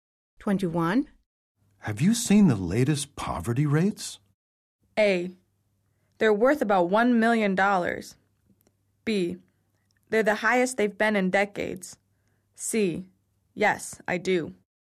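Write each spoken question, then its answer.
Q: Have you seen the latest poverty rates?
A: B: They're the highest they've been in decades.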